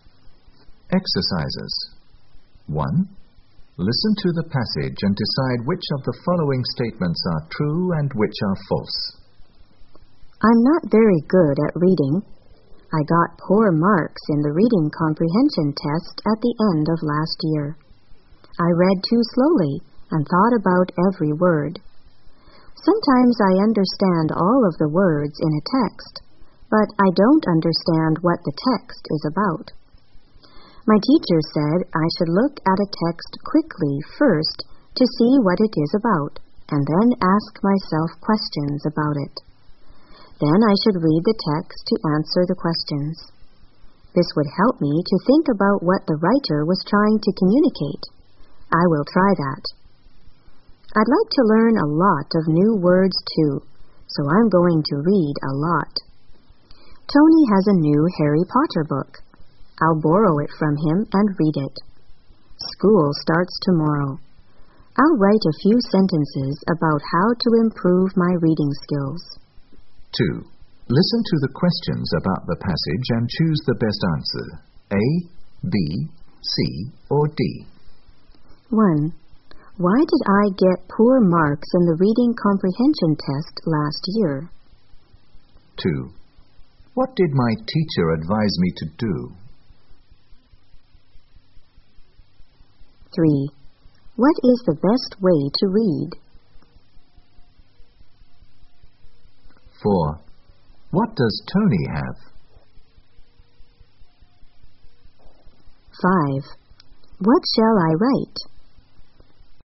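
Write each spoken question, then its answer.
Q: Why did I get poor marks in the reading comprehension test last year?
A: Because I read too slowly and thought about every word.

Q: What did my teacher advise me to do?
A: Look at a text quickly first to see what it is about, then ask myself questions about it.

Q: What does Tony have?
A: A new Harry Potter book.

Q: What shall I write?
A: A few sentences about how to improve my reading skills.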